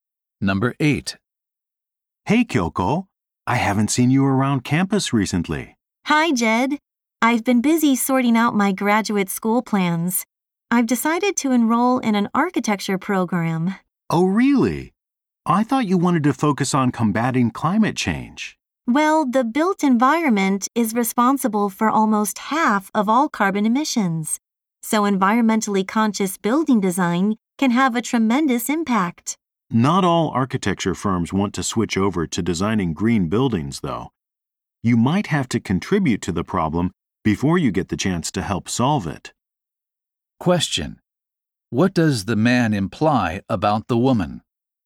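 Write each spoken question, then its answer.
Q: What does the man imply about the woman?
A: She may first have to work on buildings that are not green.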